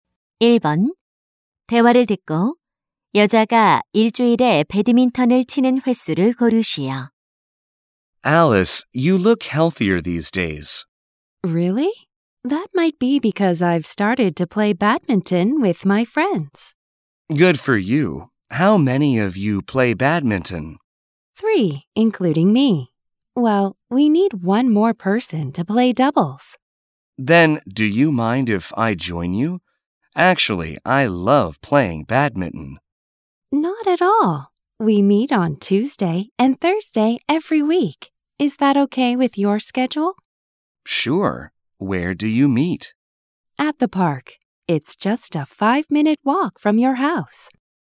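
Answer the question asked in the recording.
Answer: 일주일에 두 번 (화요일, 목요일)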